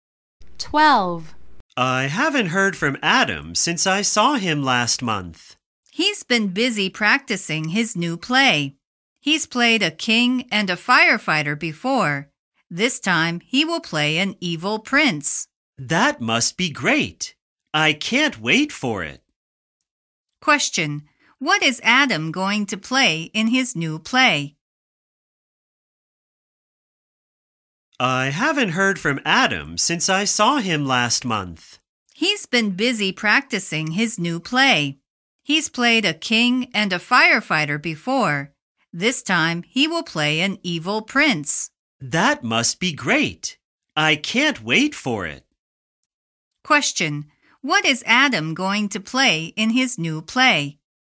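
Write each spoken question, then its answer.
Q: What is Adam going to play in his new play?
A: An evil prince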